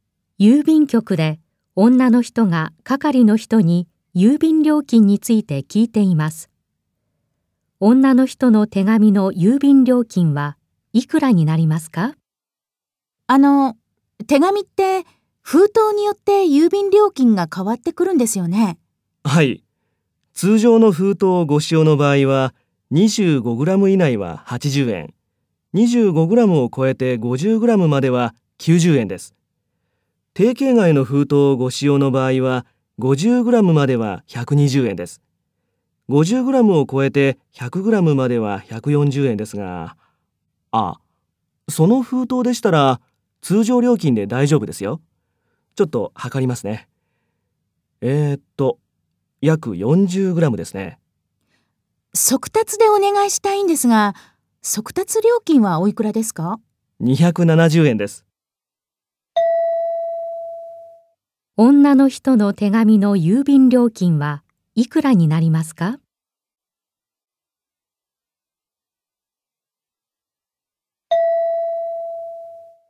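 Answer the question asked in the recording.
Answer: 360円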